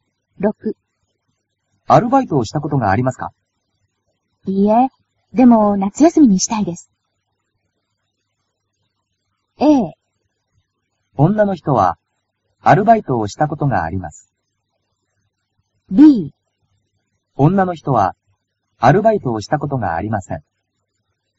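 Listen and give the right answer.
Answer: B: 女の人は、アルバイトをしたことがありません。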